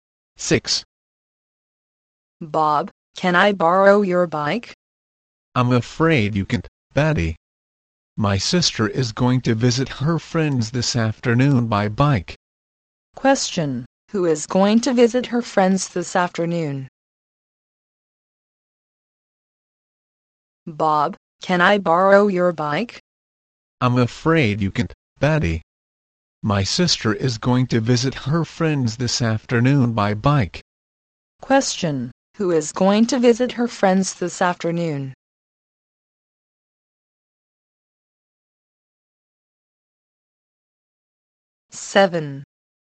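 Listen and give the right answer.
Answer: Bob's sister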